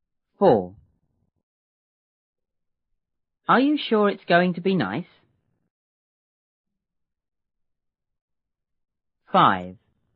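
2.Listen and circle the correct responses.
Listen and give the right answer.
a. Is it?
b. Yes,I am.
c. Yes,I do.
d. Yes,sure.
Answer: b. Yes,I am.

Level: 六年级下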